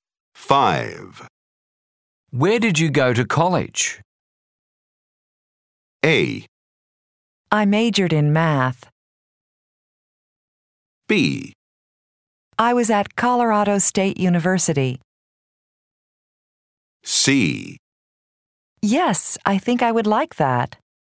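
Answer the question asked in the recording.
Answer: B: I was at Colorado State University.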